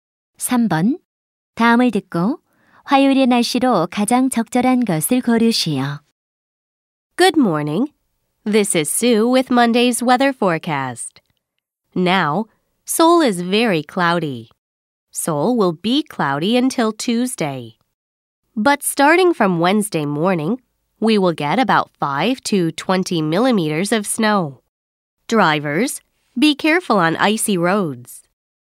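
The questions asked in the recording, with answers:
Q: 다음을 듣고 화요일의 날씨로 가장 적절한 것을 고르시오.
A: 흐림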